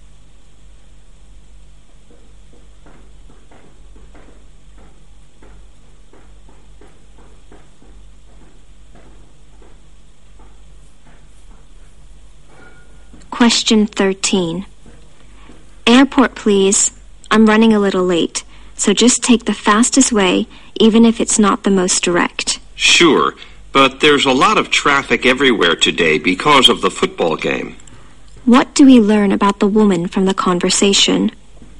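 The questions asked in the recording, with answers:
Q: What do we learn about the woman from the conversation?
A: She is in a hurry to get to the airport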